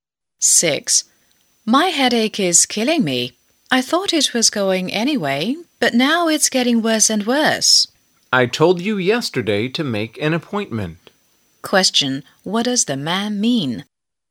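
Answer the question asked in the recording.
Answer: The woman should have made an appointment with the doctor yesterday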